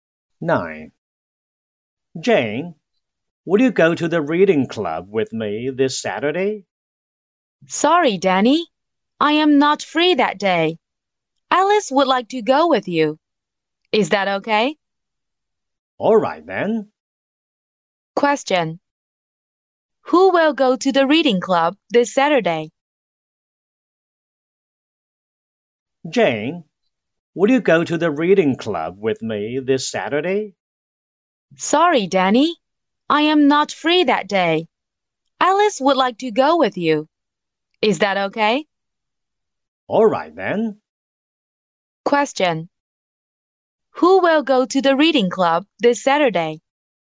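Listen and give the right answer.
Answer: Danny and Alice.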